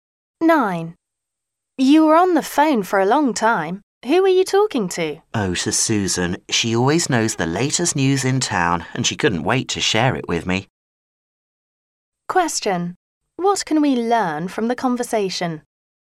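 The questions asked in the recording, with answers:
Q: What can we learn from the conversation?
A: Susan loves to share the latest news in town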